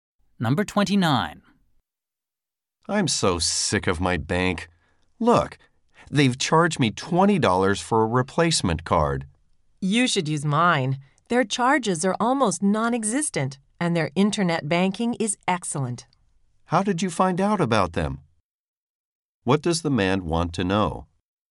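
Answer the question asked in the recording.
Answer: How the woman found out about her bank.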